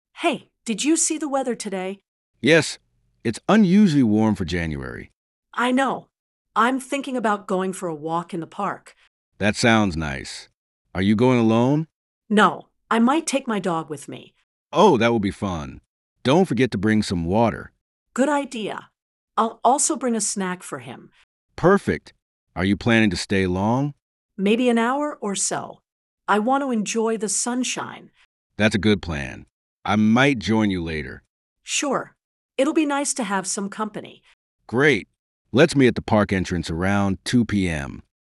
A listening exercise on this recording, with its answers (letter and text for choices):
Listen to a conversation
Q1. Why is A planning to go to the park?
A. To exercise with friends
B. To enjoy the warm weather and sunshine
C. To meet B for a meeting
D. To buy snacks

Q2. What does B suggest A should do before going to the park?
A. Bring an umbrella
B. Bring water and snacks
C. Go alone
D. Wear a jacket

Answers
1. B. To enjoy the warm weather and sunshine
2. B. Bring water and snacks

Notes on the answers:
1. 대화에서 여자는 날씨가 따뜻해서 햇살을 즐기길 원해서 산책을 계획한 것
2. 남자는 여자에게 물을 챙겨 오라고 알려주며 여자는 개를 위한 간식을 언급했음. 이런 일들은 산책을 위한 준비에 해당함.

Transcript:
A: Hey, did you see the weather today?
B: Yes, it's unusually warm for January.
A: I know! I'm thinking about going for a walk in the park.
B: That sounds nice. Are you going alone?
A: No, I might take my dog with me.
B: Oh, that will be fun. Don't forget to bring some water.
A: Good idea. I'll also bring a snack for him.
B: Perfect! Are you planning to stay long?
A: Maybe an hour or so. I want to enjoy the sunshine.
B: That's a good plan. I might join you later.
A: Sure! It'll be nice to have some company.